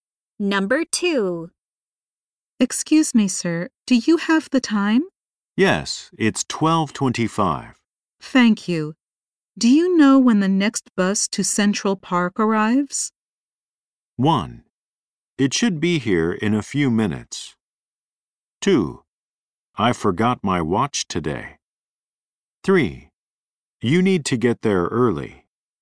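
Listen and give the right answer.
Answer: 1: It should be here in a few minutes.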